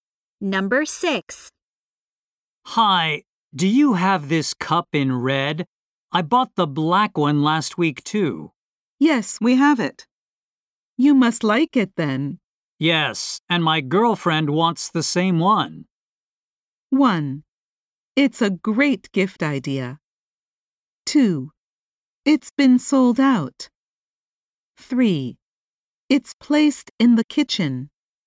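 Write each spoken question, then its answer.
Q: Yes, and my girlfriend wants the same one.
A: 1: It's a great gift idea.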